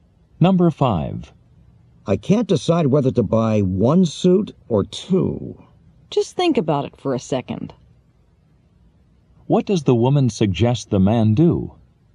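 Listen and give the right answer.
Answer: Think about it before deciding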